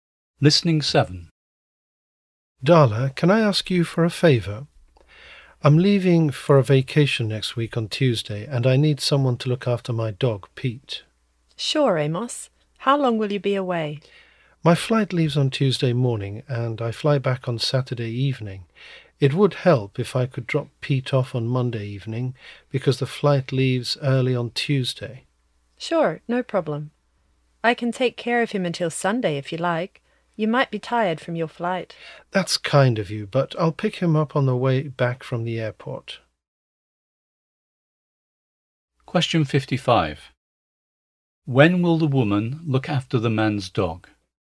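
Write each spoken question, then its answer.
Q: When will the woman look after the man's dog?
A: From Monday evening to Saturday evening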